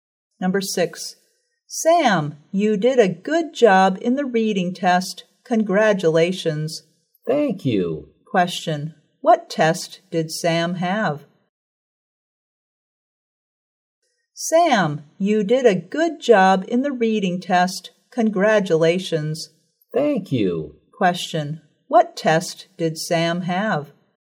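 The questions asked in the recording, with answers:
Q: Question, what test did Sam have?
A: A reading test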